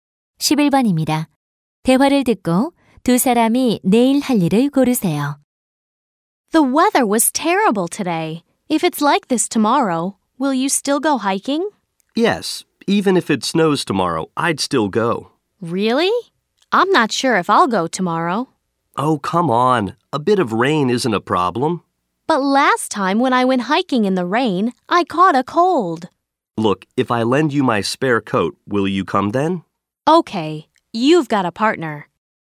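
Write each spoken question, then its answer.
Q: 대화를 듣고 두 사람이 내일 할 일을 고르세요.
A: 등산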